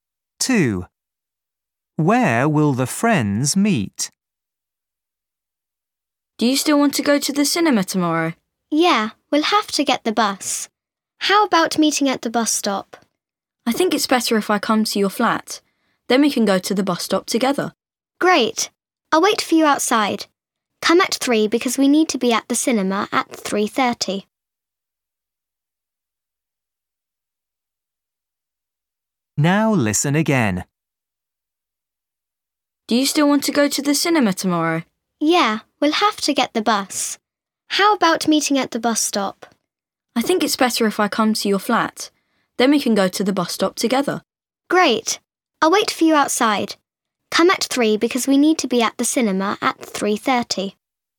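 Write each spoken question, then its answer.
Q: Where will the friends meet?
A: outside the friend's flat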